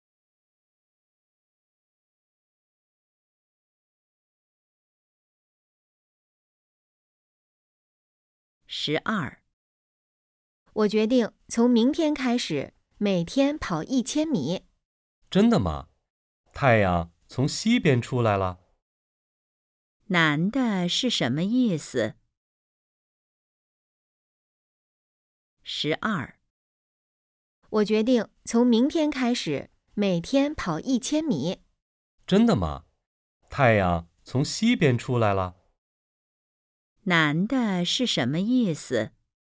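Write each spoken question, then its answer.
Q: 男的是什么意思?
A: 不相信女的会每天跑步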